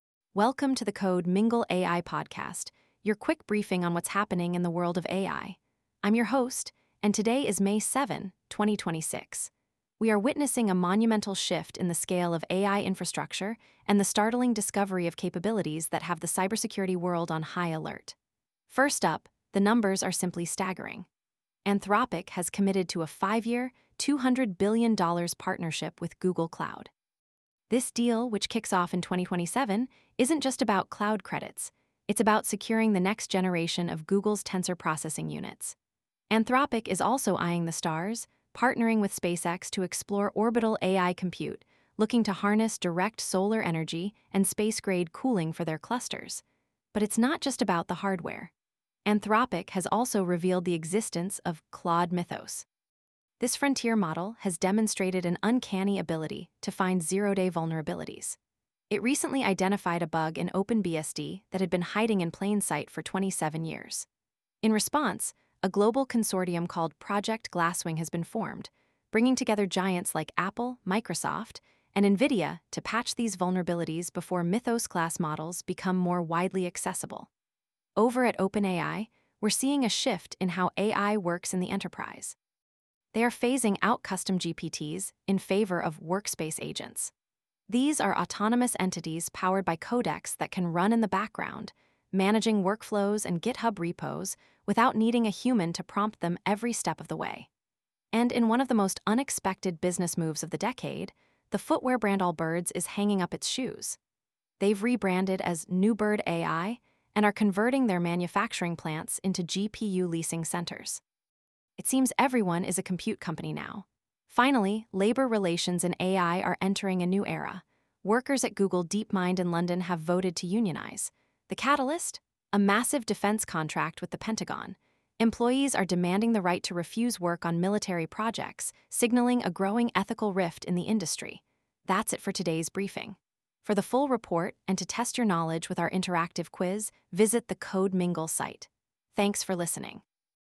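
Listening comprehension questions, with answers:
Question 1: How much has Anthropic committed to spend with Google Cloud over the next five years?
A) $20 billion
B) $100 billion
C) $200 billion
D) $500 billion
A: C) $200 billion

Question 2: What is the name of the Anthropic model that discovered a 27-year-old OpenBSD bug?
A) Claude 4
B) Claude Mythos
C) Claude Glasswing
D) Claude Maverick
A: B) Claude Mythos

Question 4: What is the new name of the company formerly known as Allbirds?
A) WoolAI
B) NewBird AI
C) Compute Runner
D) ShoeGPT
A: B) NewBird AI

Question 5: What triggered the unionization vote at Google DeepMind?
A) Low wages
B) A Pentagon defense contract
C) Mandatory RTO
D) The cancellation of Gemini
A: B) A Pentagon defense contract

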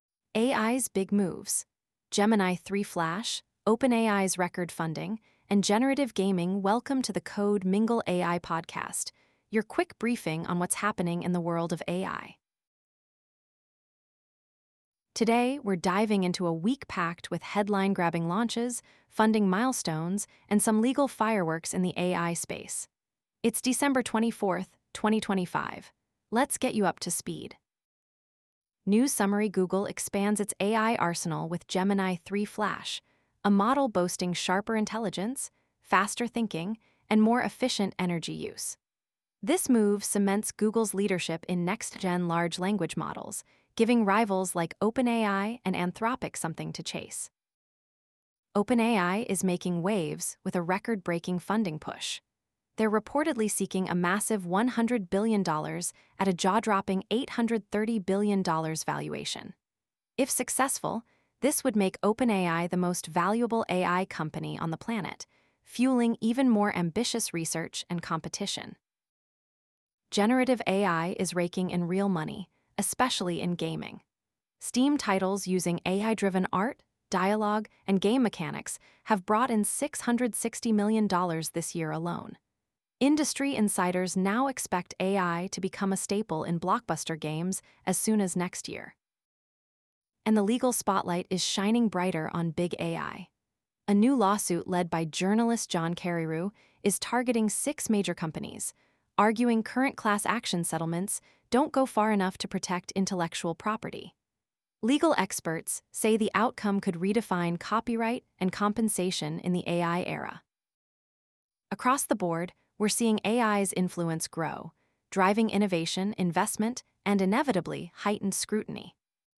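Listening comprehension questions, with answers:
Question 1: What is the primary advancement offered by Google's Gemini 3 Flash compared to previous models?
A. Increased model size for better accuracy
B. Improved intelligence and efficiency with faster inference and lower resource usage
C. Exclusive focus on consumer applications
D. Integration with only on-device AI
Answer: B. Improved intelligence and efficiency with faster inference and lower resource usage

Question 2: How much funding is OpenAI reportedly seeking in its latest round, and at what valuation?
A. $61 billion at a $100 billion valuation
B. $830 million at a $100 billion valuation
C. $100 billion at an $830 billion valuation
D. $100 million at an $830 million valuation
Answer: C. $100 billion at an $830 billion valuation

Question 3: Which sector has seen a notable surge in generative AI adoption, resulting in $660 million in revenue this year?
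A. Healthcare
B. Gaming (Steam titles)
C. Automotive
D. Retail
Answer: B. Gaming (Steam titles)

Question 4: What competitive advantage does the Gemini 3 suite provide Google in the AI industry?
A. First to market with quantum AI chips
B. Leadership in next-generation LLM technology through advanced transformer architectures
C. Exclusive partnerships with sovereign wealth funds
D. Largest AI data center network globally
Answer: B. Leadership in next-generation LLM technology through advanced transformer architectures

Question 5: What broader trend is reflected by recent legal and regulatory developments in the AI sector?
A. Decreased interest in AI ethics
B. Growing scrutiny and strategic competition among AI companies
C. Reduction in AI funding rounds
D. Decline in AI adoption across sectors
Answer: B. Growing scrutiny and strategic competition among AI companies

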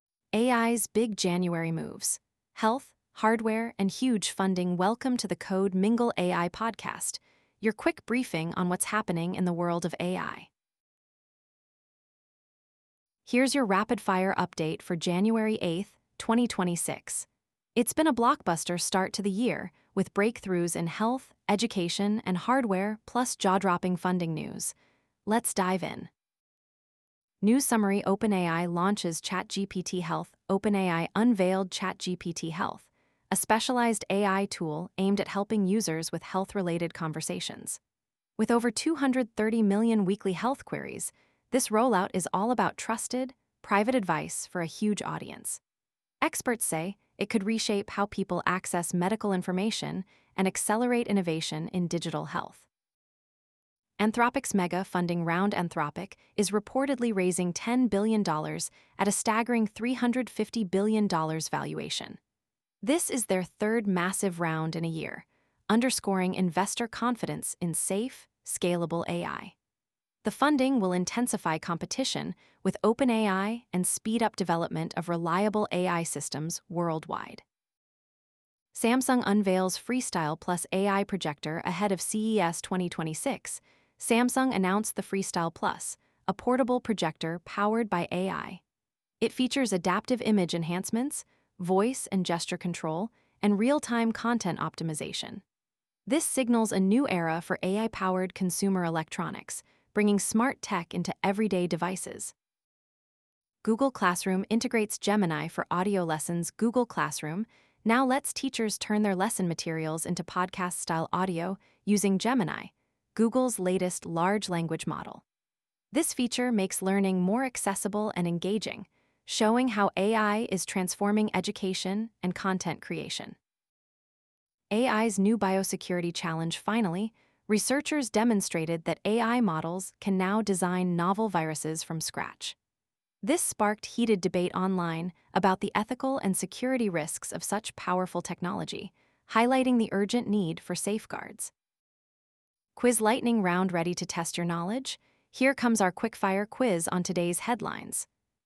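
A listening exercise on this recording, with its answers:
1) What is the primary purpose of OpenAI's newly launched ChatGPT Health?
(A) To provide entertainment recommendations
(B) To support health-related conversations with privacy and trust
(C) To assist with financial planning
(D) To translate languages in real time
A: (B) To support health-related conversations with privacy and trust

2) How many weekly health-related queries is ChatGPT Health expected to address?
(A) 23 million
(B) 100 million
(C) 230 million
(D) 1 billion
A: (C) 230 million

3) What is the reported valuation Anthropic is seeking with its latest funding round?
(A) $100B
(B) $200B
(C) $350B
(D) $500B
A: (C) $350B

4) Which feature is NOT mentioned as part of Samsung's Freestyle+ AI projector?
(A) Adaptive image enhancement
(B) Voice and gesture control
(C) Real-time content optimization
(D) Automated medical diagnostics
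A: (D) Automated medical diagnostics

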